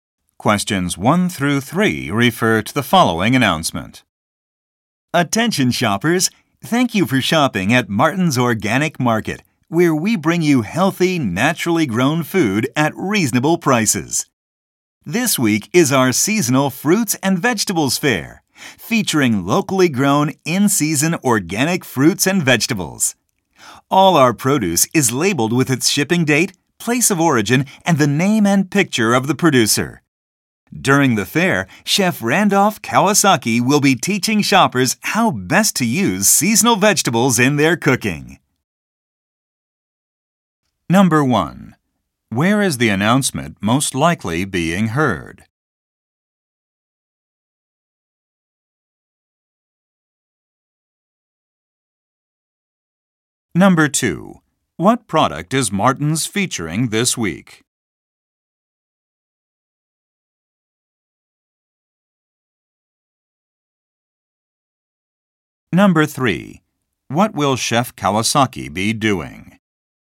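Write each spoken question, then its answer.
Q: Where is the announcement most likely being heard?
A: In a grocery store (Martin's Organic Market)

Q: What product is Martin's featuring this week?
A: Locally grown seasonal organic fruits and vegetables

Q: What will Chef Kawasaki be doing?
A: Teaching shoppers how to cook with seasonal vegetables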